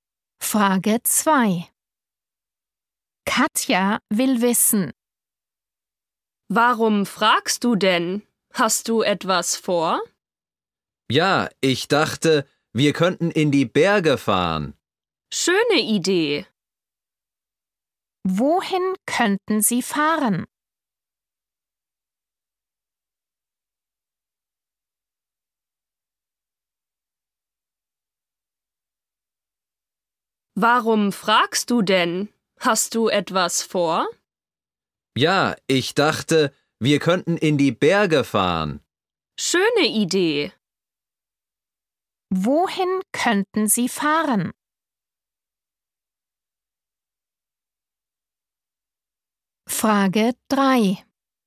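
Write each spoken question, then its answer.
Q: Wohin könnten Sie fahren?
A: In die Berge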